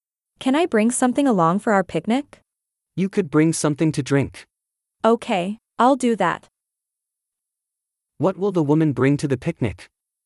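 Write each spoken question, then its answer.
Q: What will the woman bring to the picnic?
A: Something to drink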